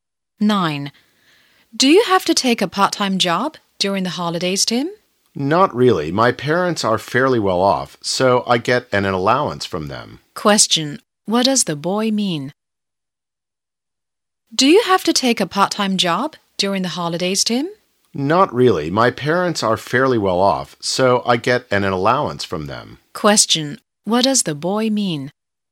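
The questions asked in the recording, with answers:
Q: What does the boy mean?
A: He doesn't need a part-time job because his parents give him an allowance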